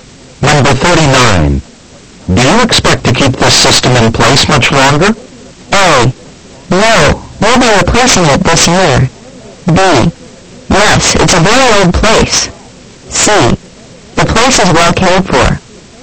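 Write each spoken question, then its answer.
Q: Do you expect to keep this system in place much longer?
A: A: No, we'll be replacing it this year.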